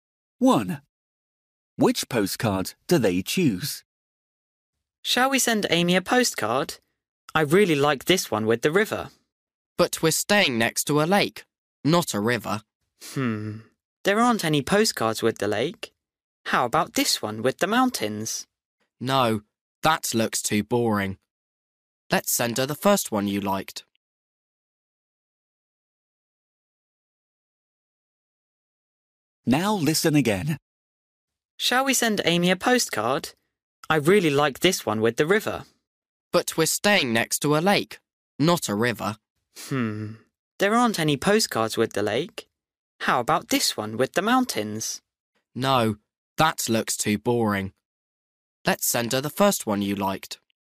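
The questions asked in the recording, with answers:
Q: Which postcard do they choose?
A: the one with the river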